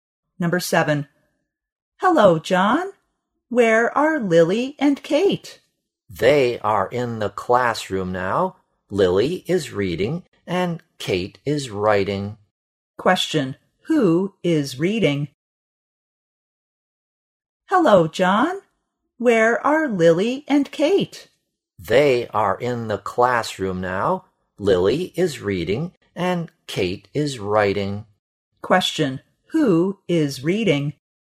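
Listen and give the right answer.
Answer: Lily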